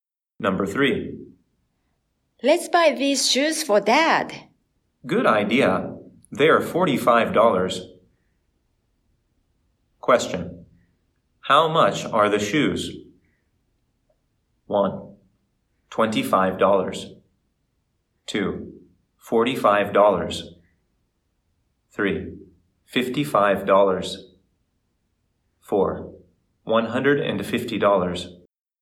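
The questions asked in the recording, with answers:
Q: How much are the shoes?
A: 2: $45.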